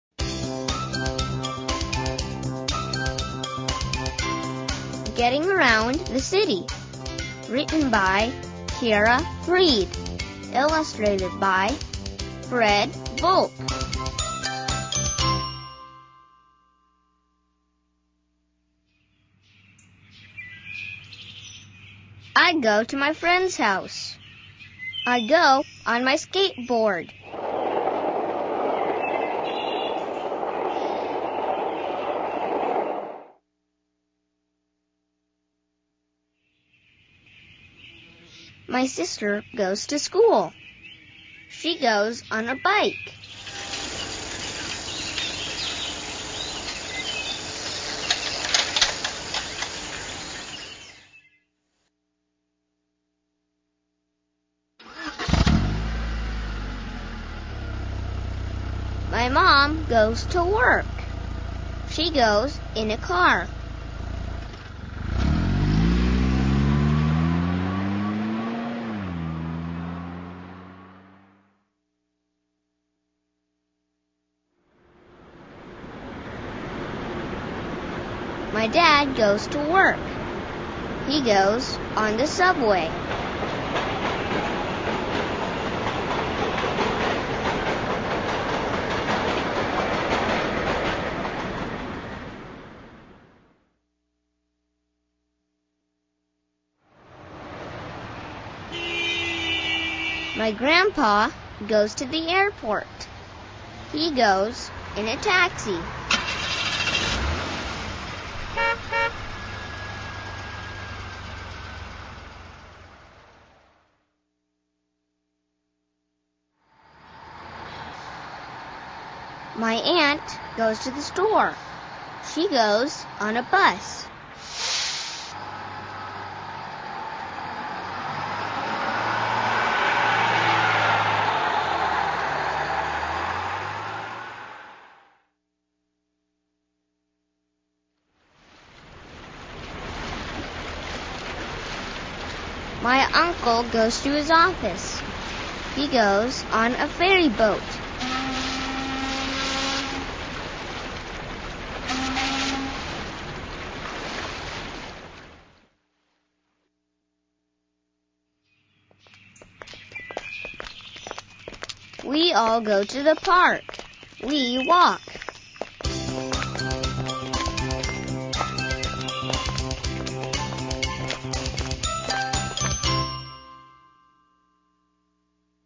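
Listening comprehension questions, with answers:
After the story, let's think about these questions.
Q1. Transportation is such an important thing to a city. Check the whole story; can you name five kinds of transportation that showed up?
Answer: skateboard, bike, car, subway, taxi (also bus, ferry boat)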